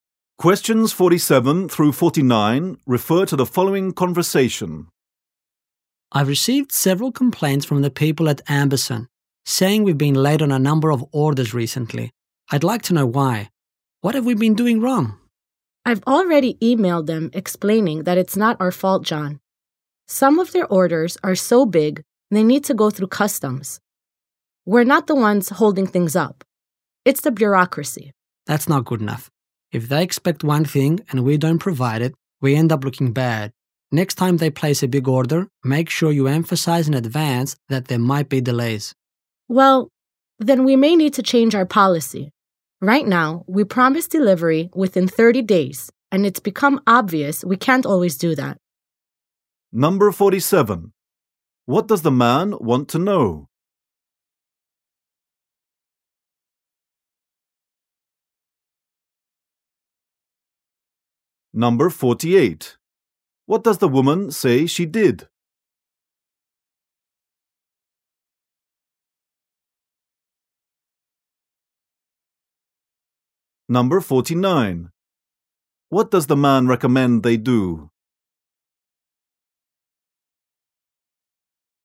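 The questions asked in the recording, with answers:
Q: What does the man want to know?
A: Why orders have been late

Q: What does the woman say she did?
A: Emailed the client to explain the delays

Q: What does the man recommend they do?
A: Warn customers in advance about possible delays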